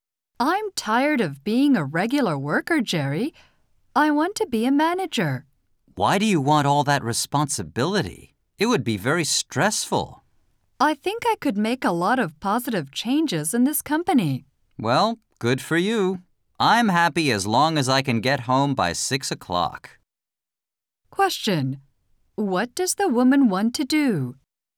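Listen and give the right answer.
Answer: Become a manager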